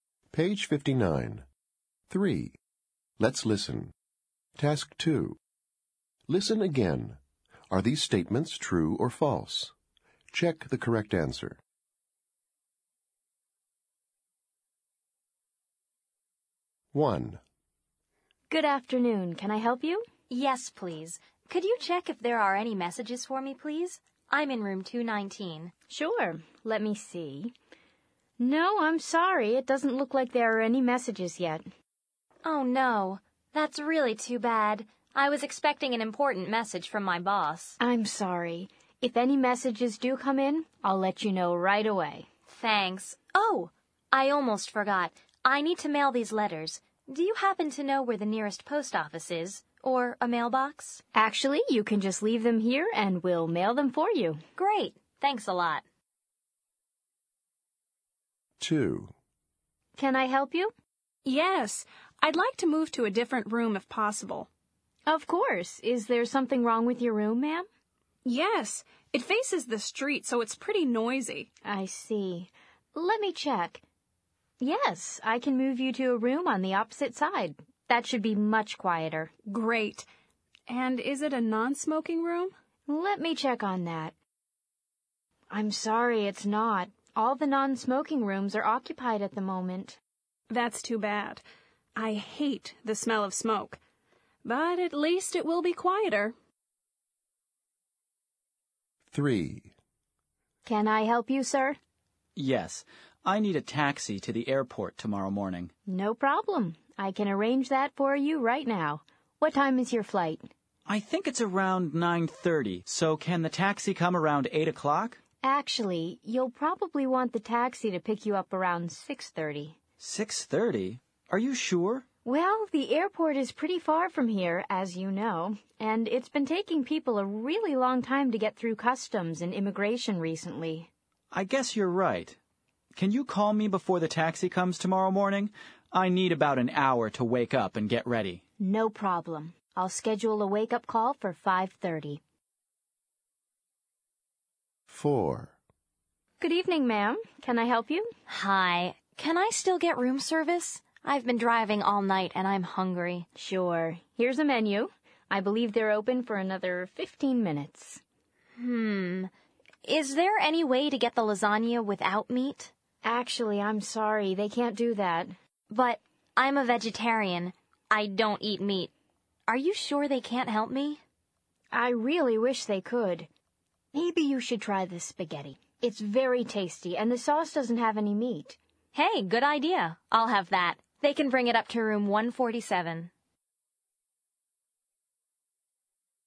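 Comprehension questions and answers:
Listen again. Are these statements true or false? Check the correct answer.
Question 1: The guest has no messages.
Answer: True

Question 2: The guest hates the smell of smoke.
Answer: True

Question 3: The guest can get ready in 30 minutes.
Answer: False

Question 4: The guest can't order lasagna without meat.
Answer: True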